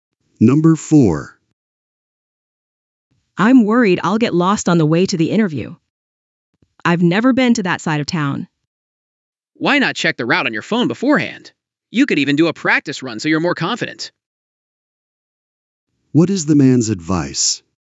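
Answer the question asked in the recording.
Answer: Check the route on the phone beforehand and maybe do a practice run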